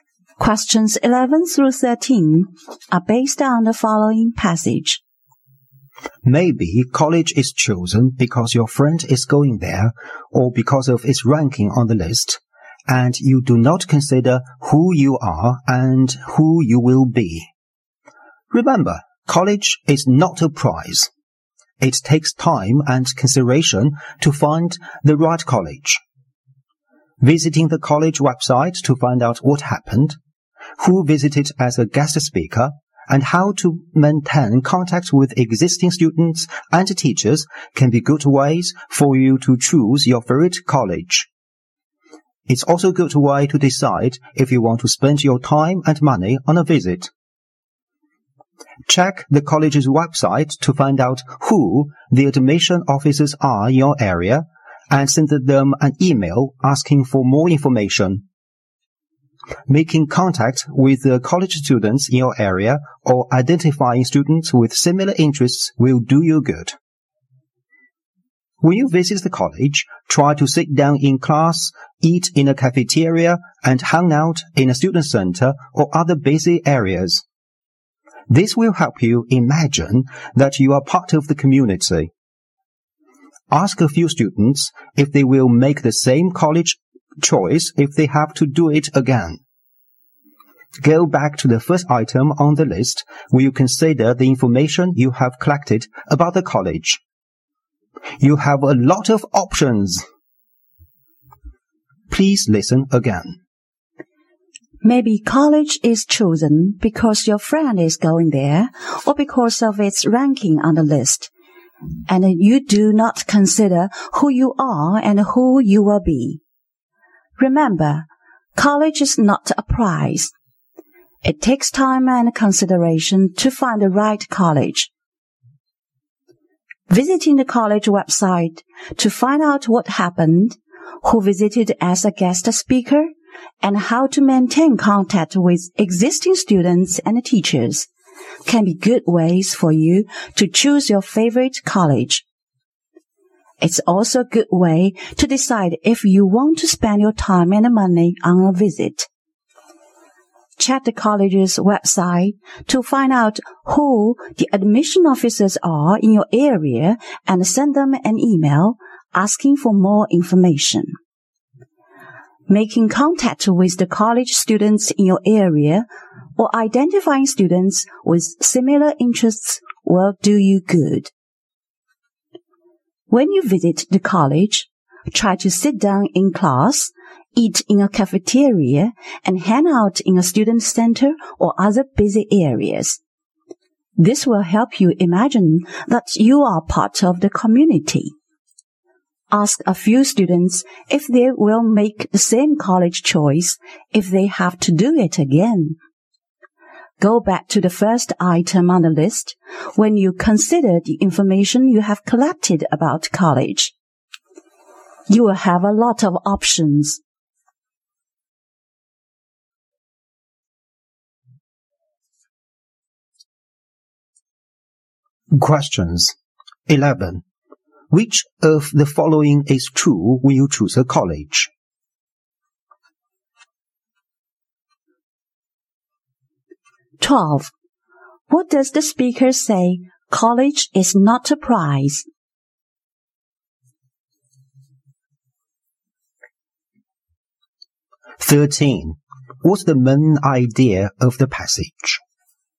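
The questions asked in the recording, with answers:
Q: What's the main idea of the passage?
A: How to choose the right college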